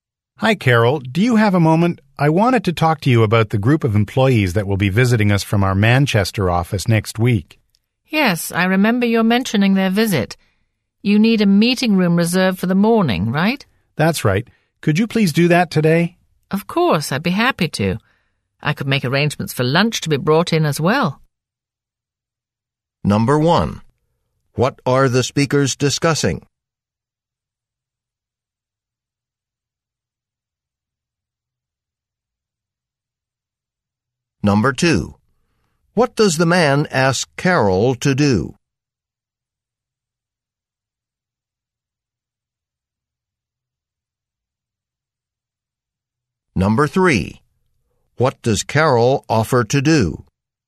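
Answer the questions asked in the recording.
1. A visit next week by employees from the Manchester office
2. Reserve a meeting room for the morning
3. Arrange for lunch to be brought in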